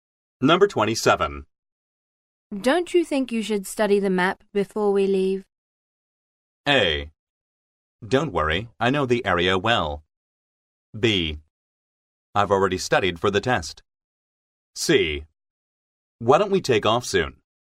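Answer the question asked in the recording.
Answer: A: Don't worry, I know the area well.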